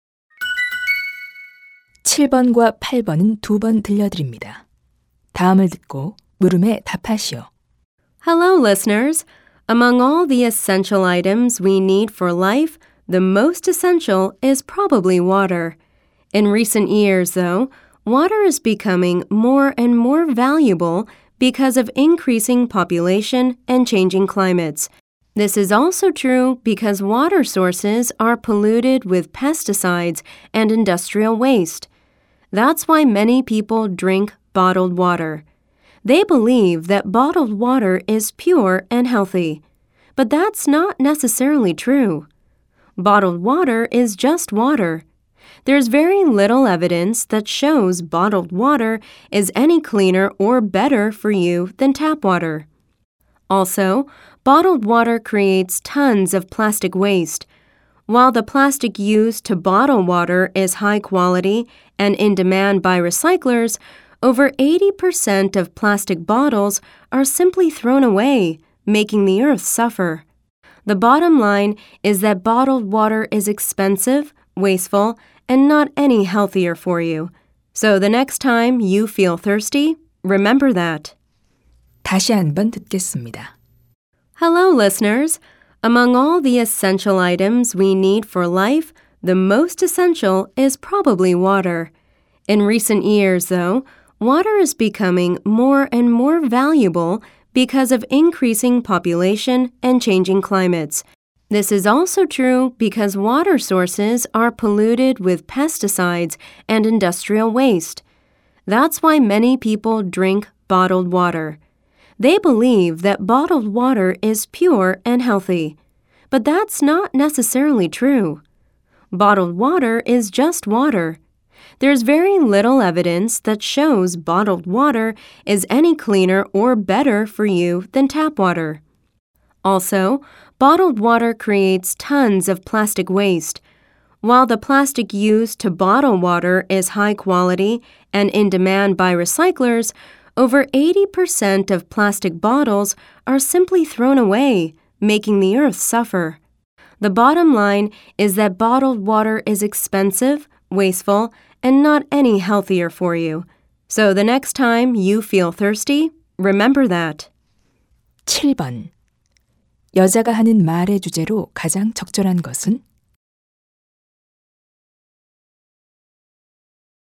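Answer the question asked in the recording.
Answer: 병에 든 생수는 수돗물보다 낫지 않고 비싸며 낭비적이다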